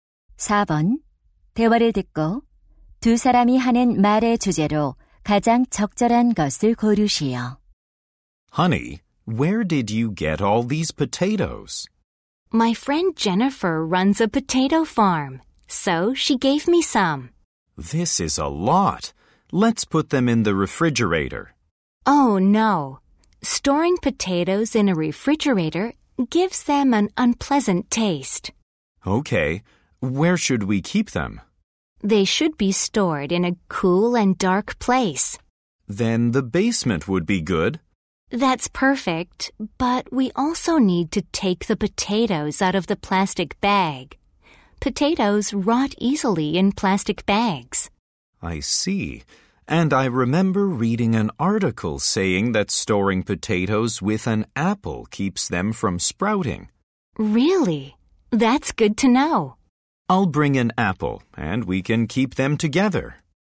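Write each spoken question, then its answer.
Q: 대화를 듣고 두 사람이 하는 말의 주제로 가장 적절한 것을 고르시오.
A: 감자를 보관하는 방법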